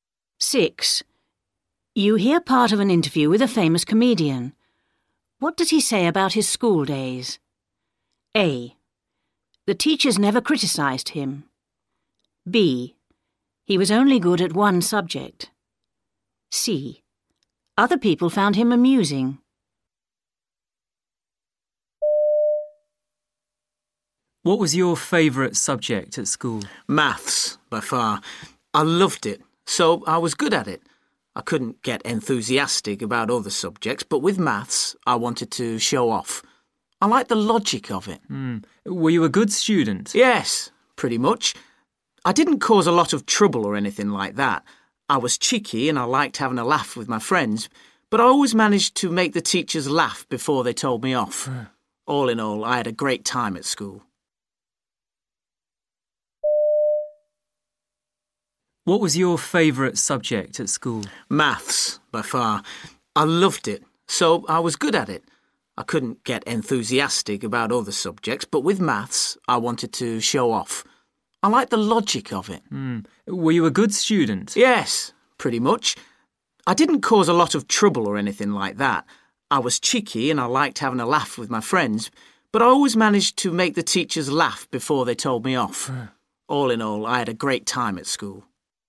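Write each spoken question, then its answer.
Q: What does he say about his school days?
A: C: Other people found him amusing.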